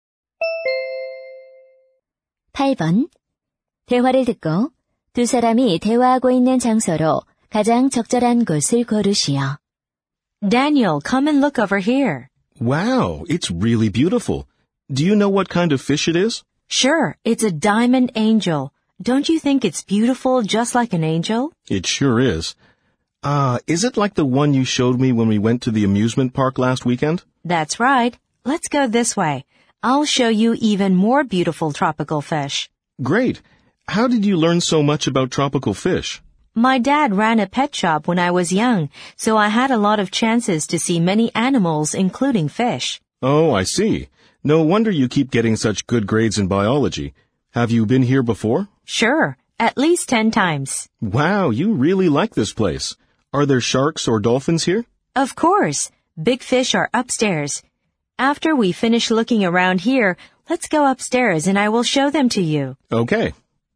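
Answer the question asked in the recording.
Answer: 수족관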